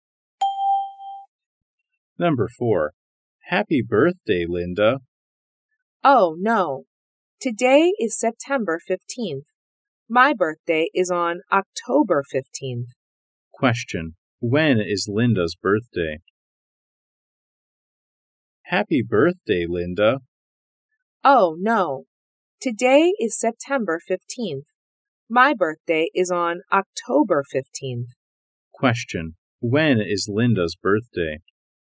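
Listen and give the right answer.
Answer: October 15th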